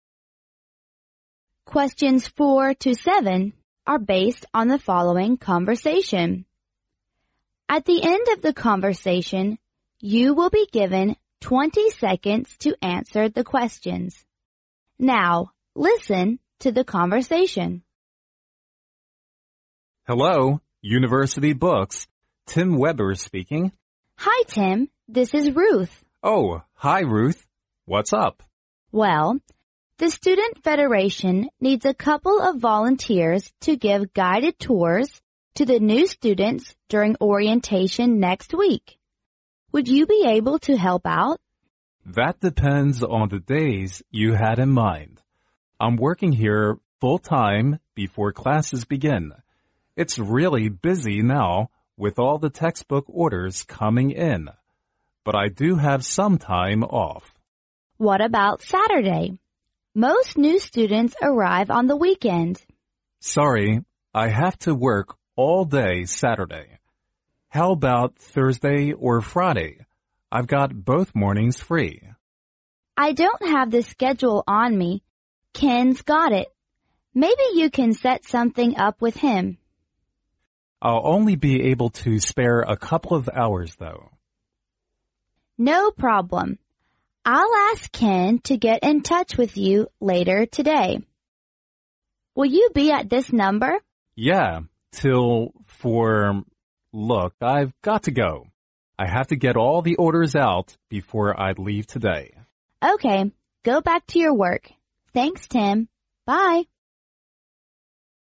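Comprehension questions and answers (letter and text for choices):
In this section you hear several conversations. Listen to the conversations carefully and then answer the questions that follow.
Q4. According to the conversation,Ruth calls Tim because she wants_____.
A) him to welcome the new students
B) him to be a volunteer for the new students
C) to see if he is free on weekends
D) to help him with the textbook orders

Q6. What does Tim offer to do?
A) To volunteer the new students full-time before classes begin.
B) To give the guided tours on Thursday and Friday.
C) To spare a couple of hours to give the guided tours.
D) To get in touch with Ken to set the schedule up later today.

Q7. What will probably happen as a result of this conversation?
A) Tim fails to give guided tours because he needs to get all the textbook orders done.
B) Tim manages to be a volunteer for the new students on both mornings of Thursday and Friday.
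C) Ken calls Tim to set their schedule up for the guided tours.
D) Ruth calls Tim to get their schedule done for the guided tours.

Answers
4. B) him to be a volunteer for the new students
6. C) To spare a couple of hours to give the guided tours.
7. C) Ken calls Tim to set their schedule up for the guided tours.

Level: 英语四级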